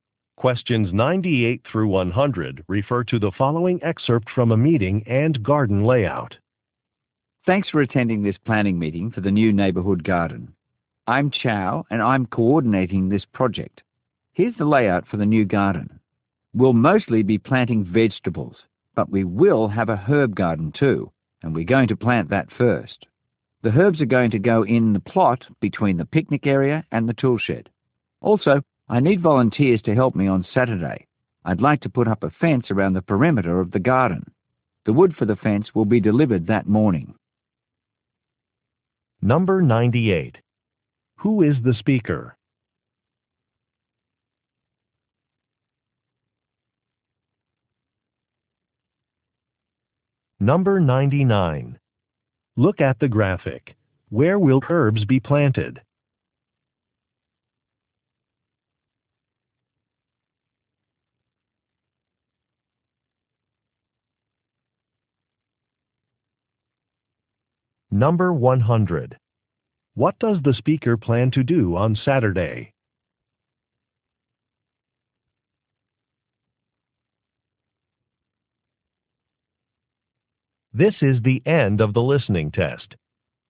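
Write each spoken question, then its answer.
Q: Who is the speaker?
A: A project coordinator for the neighborhood garden

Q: What does the speaker plan to do on Saturday?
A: Put up a fence around the garden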